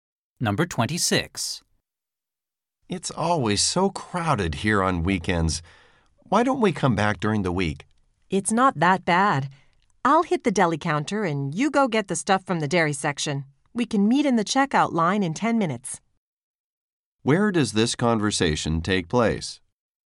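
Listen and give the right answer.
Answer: In a supermarket.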